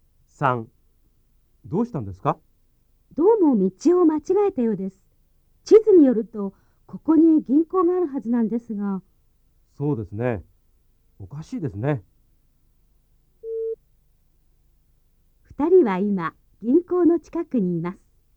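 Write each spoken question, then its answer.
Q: 二人は今、銀行の近くにいます。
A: ×(道を間違えたようです)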